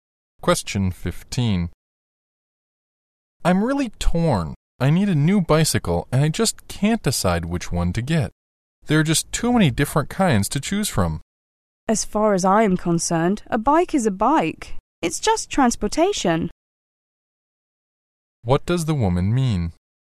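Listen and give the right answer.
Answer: Any bike will do, because a bike is just transportation.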